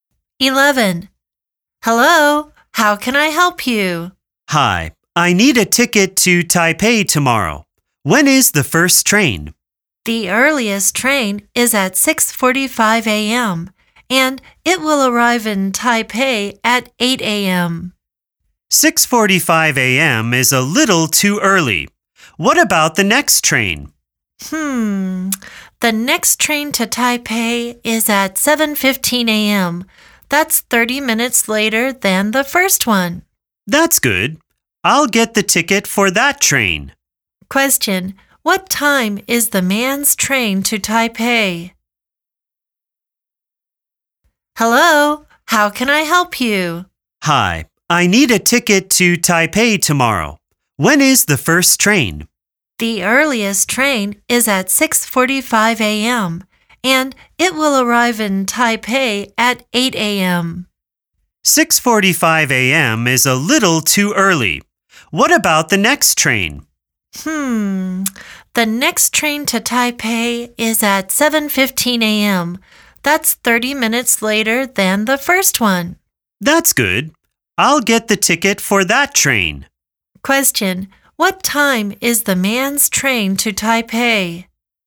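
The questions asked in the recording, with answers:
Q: Question, what time is the man's train to Taipei?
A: 7:15 a.m.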